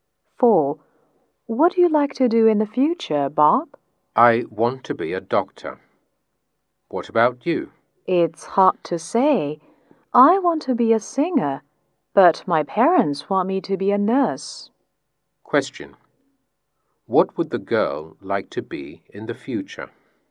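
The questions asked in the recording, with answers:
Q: What would the girl like to be in the future?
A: A singer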